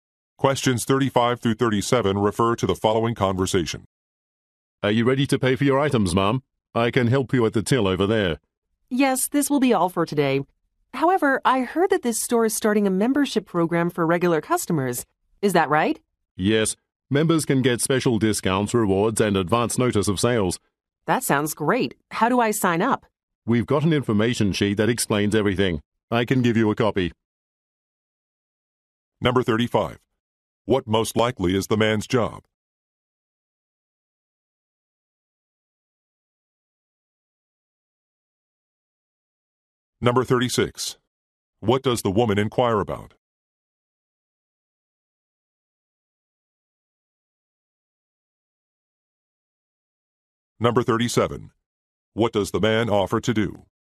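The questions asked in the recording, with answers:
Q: What most likely is the man's job?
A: Store cashier

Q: What does the woman inquire about?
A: A membership program

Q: What does the man offer to do?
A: Give her an information sheet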